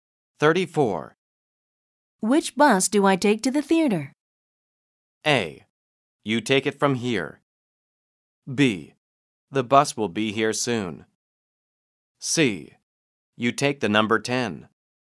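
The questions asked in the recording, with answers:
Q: Which bus do I take to the theater?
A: C: You take the number 10.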